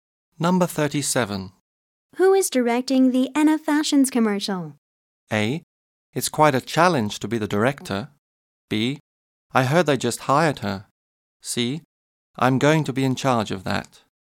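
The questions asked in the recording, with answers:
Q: Who is directing the Anna Fashions commercial?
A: C: I'm going to be in charge of that.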